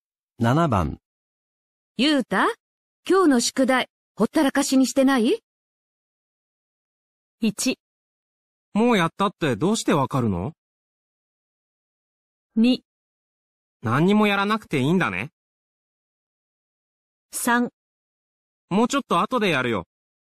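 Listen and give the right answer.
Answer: 3: もうちょっと後でやるよ。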